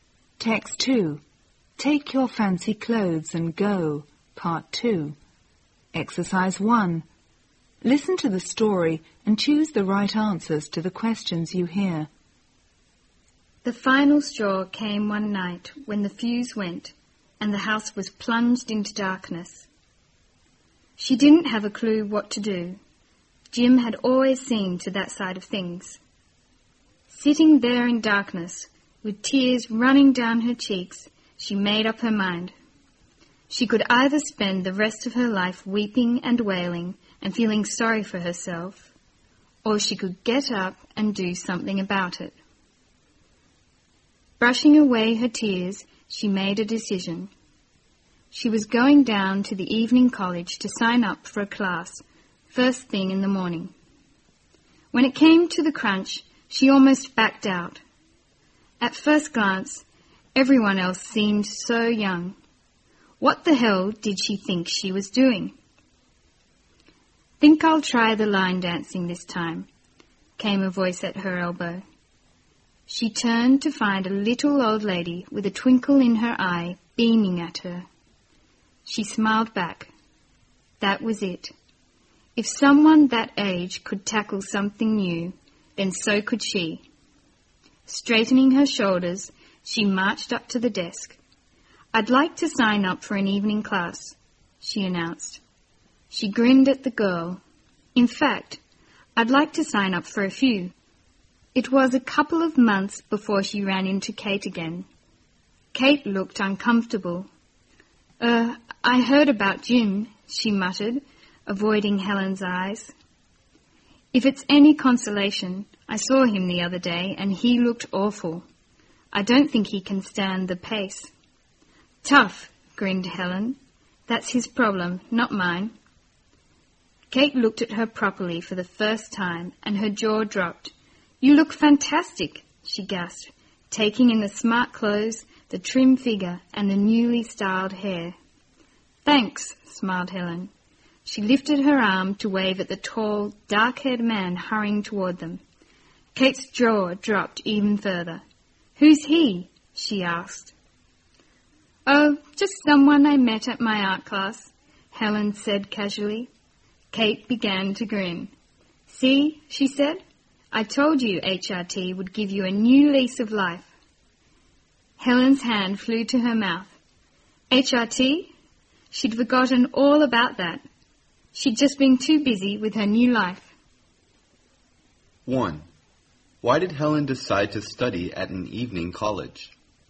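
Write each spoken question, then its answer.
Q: Why did Helen decide to study at an evening college?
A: She decided to stop feeling sorry for herself and do something about her life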